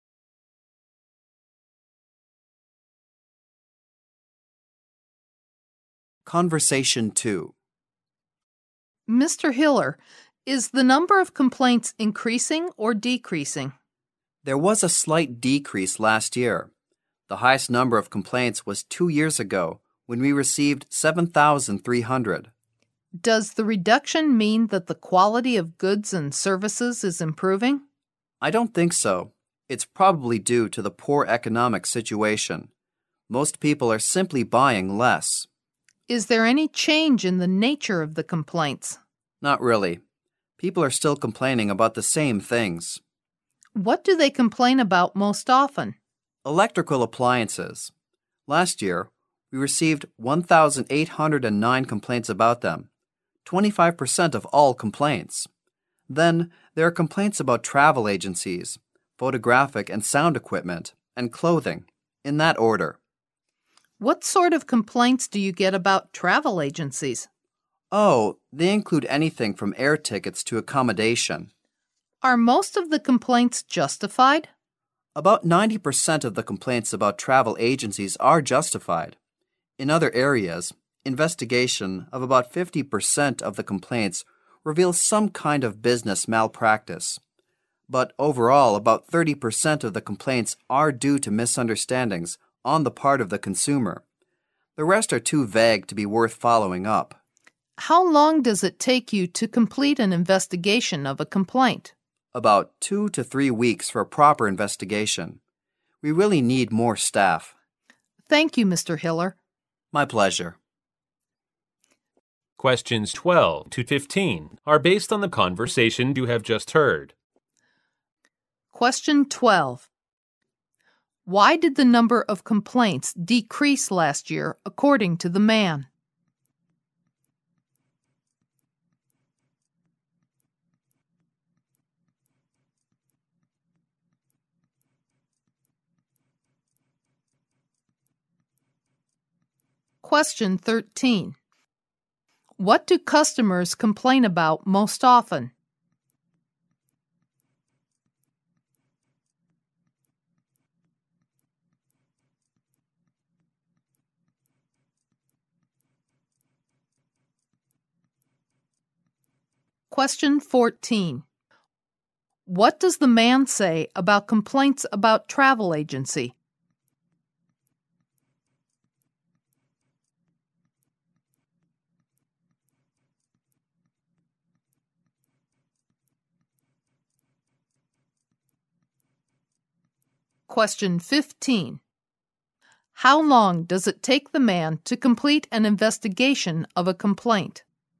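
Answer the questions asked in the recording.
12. Because of the poor economic situation; people are buying less.
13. Electrical appliances.
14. About 90% of them are justified.
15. About 2 to 3 weeks.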